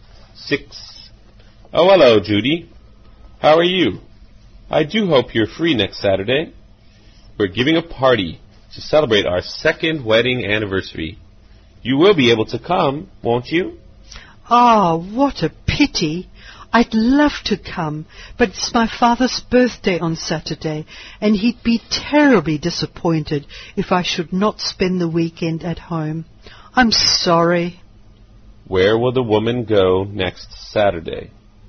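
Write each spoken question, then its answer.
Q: Where will the woman go next Saturday?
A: Home, for her father's birthday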